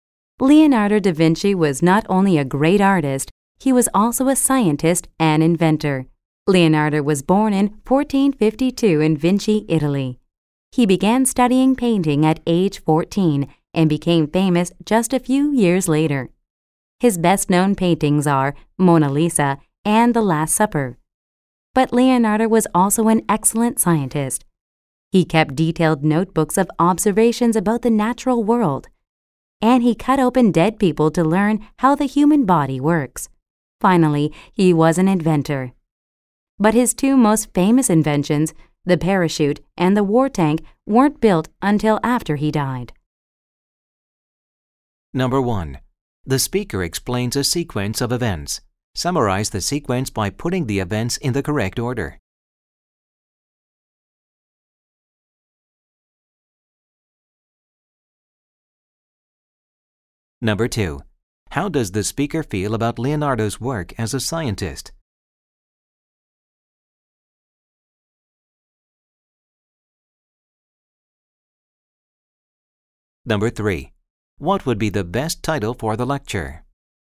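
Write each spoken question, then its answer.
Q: How does the speaker feel about Leonardo's work as a scientist?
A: He admires it; he thinks Leonardo was an excellent scientist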